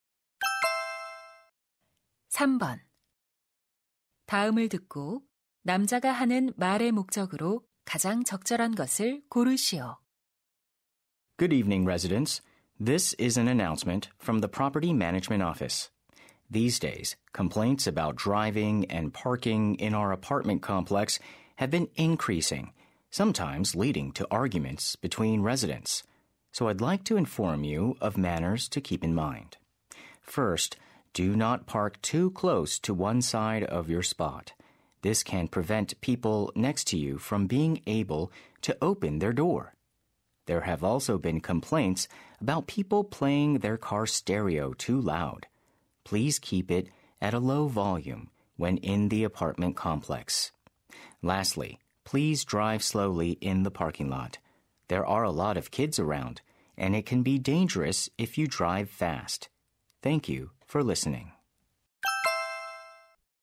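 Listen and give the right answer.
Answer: 아파트 단지 내 운전 및 주차 예절을 안내하려고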